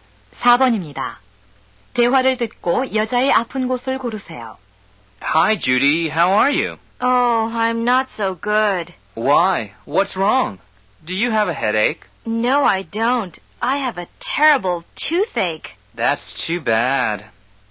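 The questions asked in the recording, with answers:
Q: 대화를 듣고 여자의 아픈 곳을 고르세요.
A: 이 (치통)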